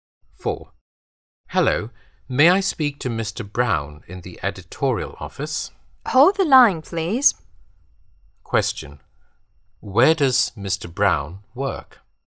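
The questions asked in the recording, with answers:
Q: Where does Mr. Brown work?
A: In the editorial office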